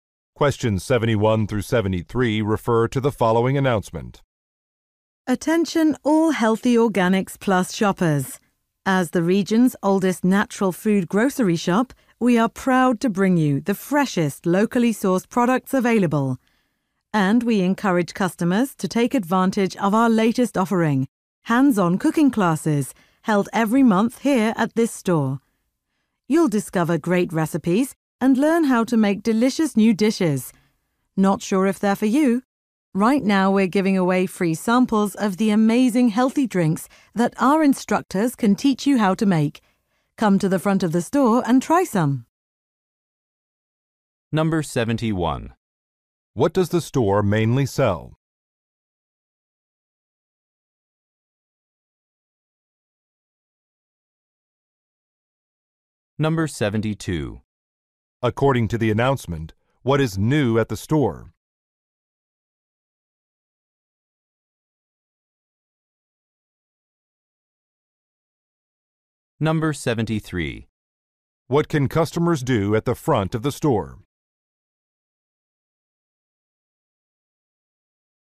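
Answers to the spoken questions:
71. Natural/organic food
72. Hands-on cooking classes
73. Try free samples of healthy drinks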